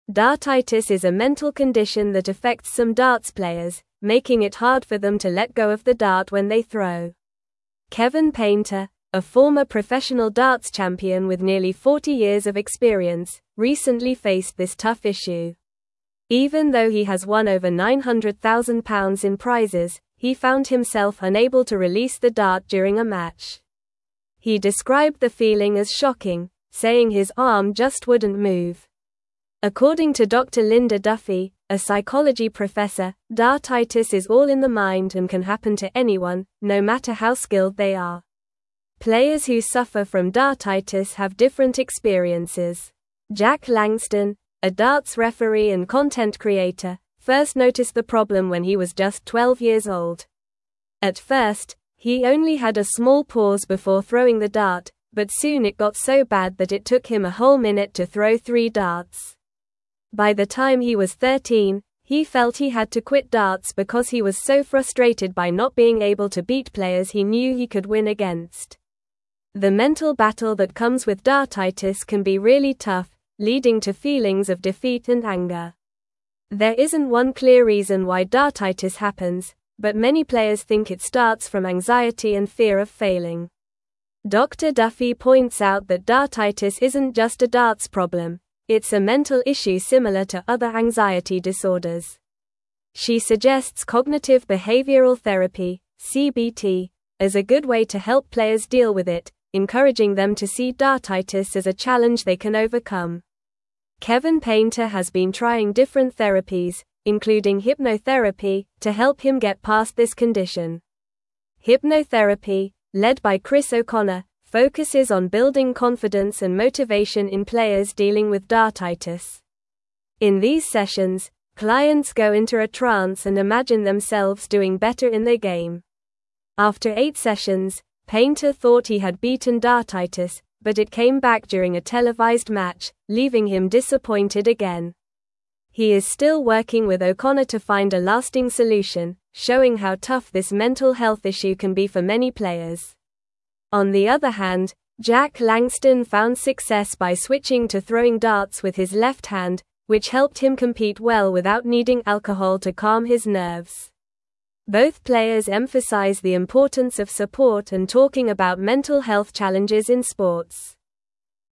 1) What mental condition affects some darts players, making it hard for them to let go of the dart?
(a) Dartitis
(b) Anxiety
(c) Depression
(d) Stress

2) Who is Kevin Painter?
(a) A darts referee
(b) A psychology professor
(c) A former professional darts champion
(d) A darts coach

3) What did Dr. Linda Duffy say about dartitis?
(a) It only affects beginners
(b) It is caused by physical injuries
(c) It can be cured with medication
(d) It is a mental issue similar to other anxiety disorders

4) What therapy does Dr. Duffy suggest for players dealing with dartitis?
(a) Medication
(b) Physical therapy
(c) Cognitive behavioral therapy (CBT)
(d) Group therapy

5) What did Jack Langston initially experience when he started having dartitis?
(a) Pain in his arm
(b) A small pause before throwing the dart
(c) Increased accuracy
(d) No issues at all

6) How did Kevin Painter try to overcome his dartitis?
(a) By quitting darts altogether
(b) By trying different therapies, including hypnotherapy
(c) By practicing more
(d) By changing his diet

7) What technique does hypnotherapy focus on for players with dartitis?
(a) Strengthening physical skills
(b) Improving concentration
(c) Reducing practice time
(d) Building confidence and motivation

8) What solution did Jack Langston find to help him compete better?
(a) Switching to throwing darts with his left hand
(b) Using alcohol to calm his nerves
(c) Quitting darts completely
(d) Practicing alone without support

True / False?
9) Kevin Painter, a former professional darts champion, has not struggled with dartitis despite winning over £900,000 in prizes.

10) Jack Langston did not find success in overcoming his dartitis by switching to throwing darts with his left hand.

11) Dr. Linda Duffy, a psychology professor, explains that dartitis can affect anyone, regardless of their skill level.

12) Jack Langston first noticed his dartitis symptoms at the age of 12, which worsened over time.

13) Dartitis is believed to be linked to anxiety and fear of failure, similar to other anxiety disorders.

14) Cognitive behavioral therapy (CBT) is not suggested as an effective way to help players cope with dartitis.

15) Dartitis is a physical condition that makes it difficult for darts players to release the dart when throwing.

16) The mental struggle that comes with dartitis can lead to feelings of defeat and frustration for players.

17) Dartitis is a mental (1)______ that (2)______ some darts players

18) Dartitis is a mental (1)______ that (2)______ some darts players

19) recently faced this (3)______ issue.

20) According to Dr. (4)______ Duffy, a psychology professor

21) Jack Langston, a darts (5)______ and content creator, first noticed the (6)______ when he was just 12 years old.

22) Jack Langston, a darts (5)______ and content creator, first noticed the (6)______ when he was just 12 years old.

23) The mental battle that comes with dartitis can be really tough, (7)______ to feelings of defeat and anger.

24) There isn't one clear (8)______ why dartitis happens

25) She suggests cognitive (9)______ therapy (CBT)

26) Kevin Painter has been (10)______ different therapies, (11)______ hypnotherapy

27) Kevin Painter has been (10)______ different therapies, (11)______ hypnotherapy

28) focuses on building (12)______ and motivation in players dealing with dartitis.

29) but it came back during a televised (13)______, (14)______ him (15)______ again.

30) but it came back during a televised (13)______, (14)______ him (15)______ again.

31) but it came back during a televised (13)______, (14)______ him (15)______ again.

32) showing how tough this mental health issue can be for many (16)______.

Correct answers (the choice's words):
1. Dartitis
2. A former professional darts champion
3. It is a mental issue similar to other anxiety disorders
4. Cognitive behavioral therapy (CBT)
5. A small pause before throwing the dart
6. By trying different therapies, including hypnotherapy
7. Building confidence and motivation
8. Switching to throwing darts with his left hand
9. False
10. False
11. True
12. True
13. True
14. False
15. False
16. True
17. condition
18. affects
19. tough
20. Linda
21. referee
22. problem
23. leading
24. reason
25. behavioral
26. trying
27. including
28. confidence
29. match
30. leaving
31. disappointed
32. players

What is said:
Dartitis is a mental condition that affects some darts players, making it hard for them to let go of the dart when they throw. Kevin Painter, a former professional darts champion with nearly 40 years of experience, recently faced this tough issue. Even though he has won over £900,000 in prizes, he found himself unable to release the dart during a match. He described the feeling as shocking, saying his arm just wouldn't move. According to Dr. Linda Duffy, a psychology professor, dartitis is all in the mind and can happen to anyone, no matter how skilled they are.
Players who suffer from dartitis have different experiences. Jack Langston, a darts referee and content creator, first noticed the problem when he was just 12 years old. At first, he only had a small pause before throwing the dart, but soon it got so bad that it took him a whole minute to throw three darts. By the time he was 13, he felt he had to quit darts because he was so frustrated by not being able to beat players he knew he could win against. The mental battle that comes with dartitis can be really tough, leading to feelings of defeat and anger.
There isn't one clear reason why dartitis happens, but many players think it starts from anxiety and fear of failing. Dr. Duffy points out that dartitis isn't just a darts problem; it's a mental issue similar to other anxiety disorders. She suggests cognitive behavioral therapy (CBT) as a good way to help players deal with it, encouraging them to see dartitis as a challenge they can overcome. Kevin Painter has been trying different therapies, including hypnotherapy, to help him get past this condition.
Hypnotherapy, led by Chris O'Connor, focuses on building confidence and motivation in players dealing with dartitis. In these sessions, clients go into a trance and imagine themselves doing better in their game. After eight sessions, Painter thought he had beaten dartitis, but it came back during a televised match, leaving him disappointed again. He is still working with O'Connor to find a lasting solution, showing how tough this mental health issue can be for many players. On the other hand, Jack Langston found success by switching to throwing darts with his left hand, which helped him compete well without needing alcohol to calm his nerves. Both players emphasize the importance of support and talking about mental health challenges in sports.

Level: Level 3